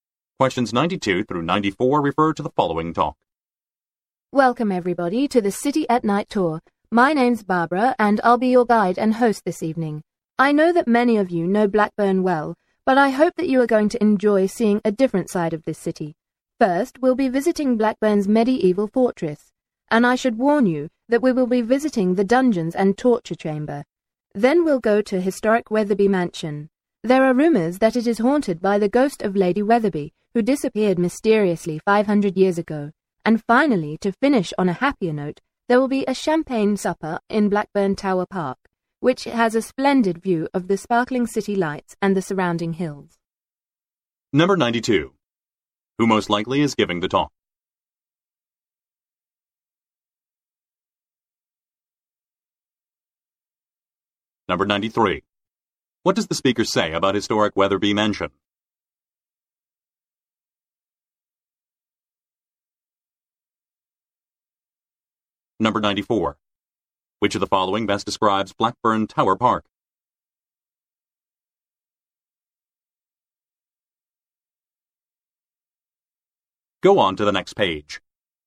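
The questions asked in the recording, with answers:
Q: Who most likely is giving the talk?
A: A tour guide

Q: What does the speaker say about historic Wetherby Mansion?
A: It is rumored to be haunted by the ghost of Lady Wetherby

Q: Which of the following best describes Blackburn Tower Park?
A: It has a splendid view of the city lights and surrounding hills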